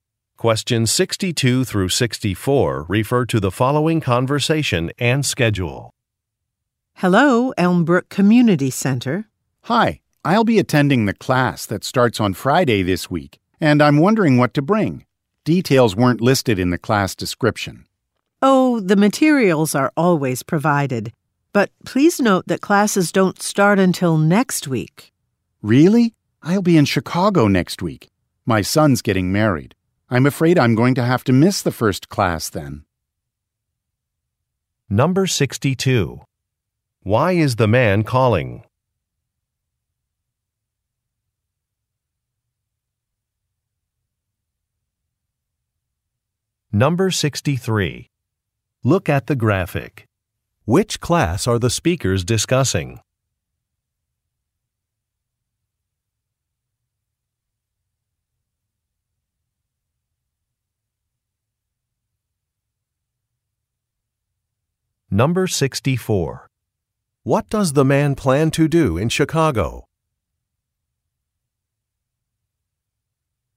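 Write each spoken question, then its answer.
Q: Why is the man calling?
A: To ask what to bring to a class

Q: What does the man plan to do in Chicago?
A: Attend his son's wedding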